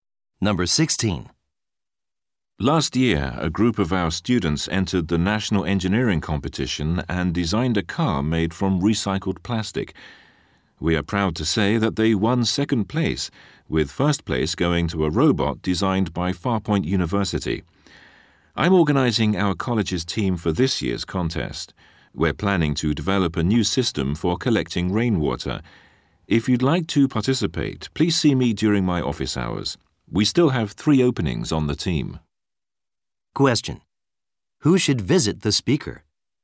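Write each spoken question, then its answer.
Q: Who should visit the speaker?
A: Students who want to join this year's engineering competition team.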